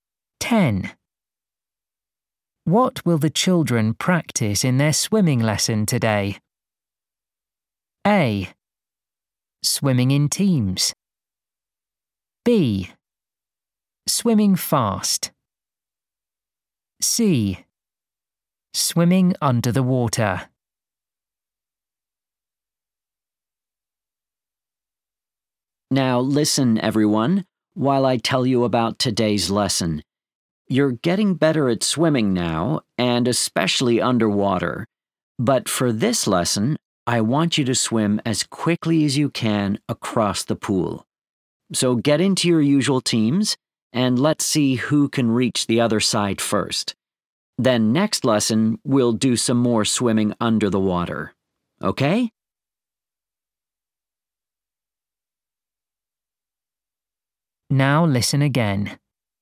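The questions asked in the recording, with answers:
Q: What will the children practice in their swimming lesson today?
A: B: Swimming fast.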